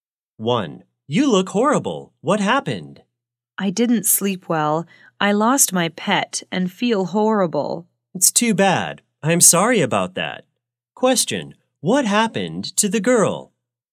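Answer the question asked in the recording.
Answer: She lost her pet and didn't sleep well.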